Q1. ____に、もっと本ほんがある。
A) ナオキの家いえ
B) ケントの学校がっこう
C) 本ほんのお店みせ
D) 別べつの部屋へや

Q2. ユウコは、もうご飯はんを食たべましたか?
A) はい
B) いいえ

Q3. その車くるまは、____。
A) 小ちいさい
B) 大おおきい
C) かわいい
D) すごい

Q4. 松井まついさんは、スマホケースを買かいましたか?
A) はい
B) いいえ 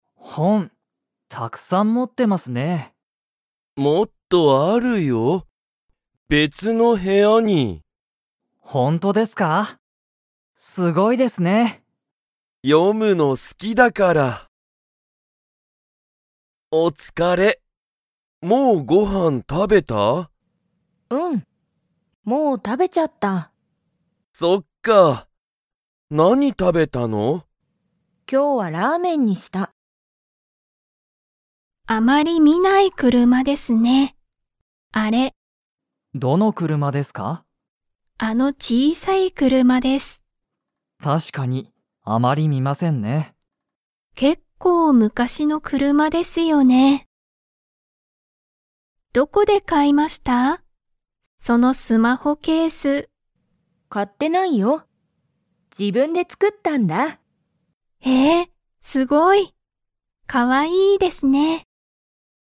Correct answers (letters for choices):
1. D
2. A
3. A
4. B

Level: Level 1